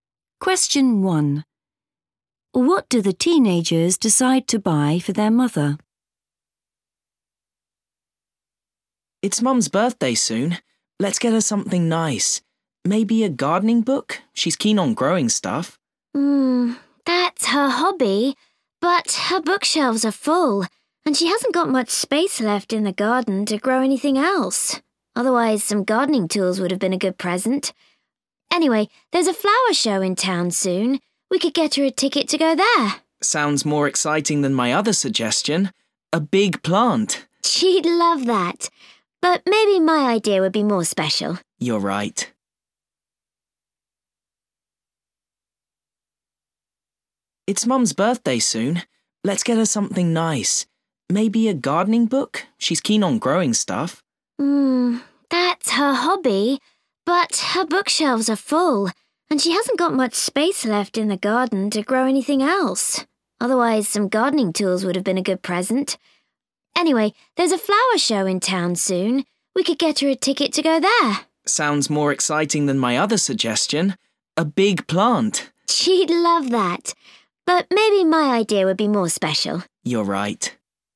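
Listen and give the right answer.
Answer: a ticket to the flower show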